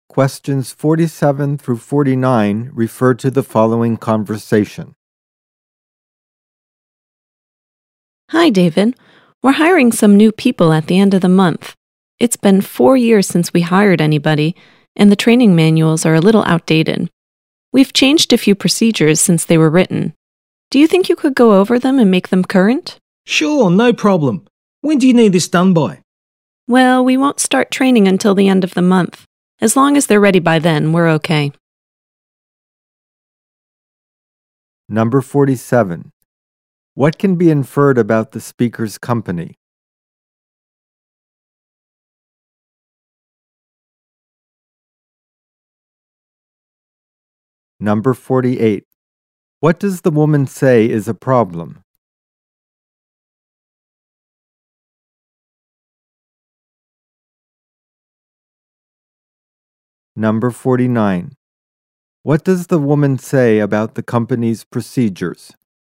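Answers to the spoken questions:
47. It is hiring new staff for the first time in 4 years
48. The training manuals are outdated
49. Some have changed since the manuals were written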